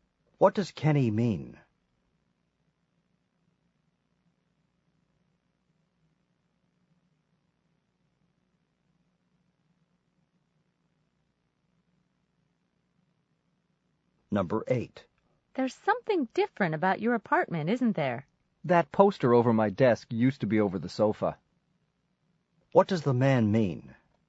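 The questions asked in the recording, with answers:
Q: What does the man mean?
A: He moved the poster from over the sofa to over his desk.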